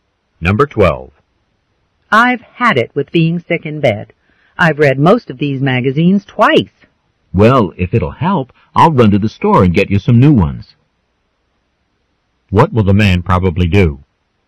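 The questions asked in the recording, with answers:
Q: What will the man probably do?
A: Go to the store and buy her some new magazines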